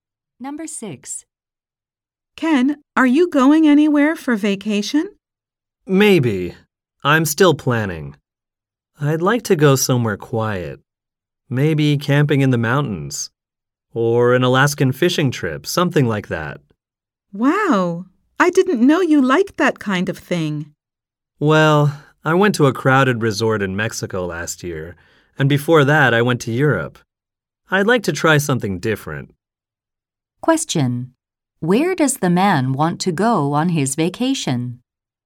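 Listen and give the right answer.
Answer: Somewhere quiet, like camping in the mountains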